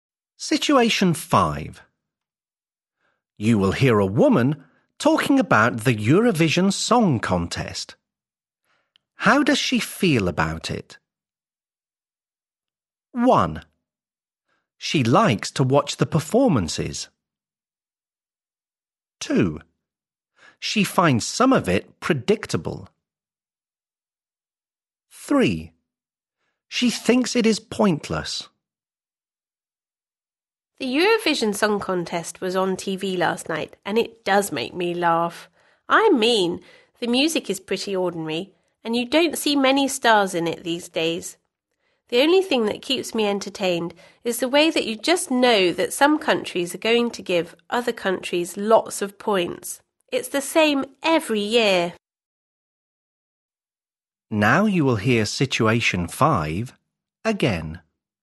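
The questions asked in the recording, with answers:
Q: How does she feel about it?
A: 2: She finds some of it predictable.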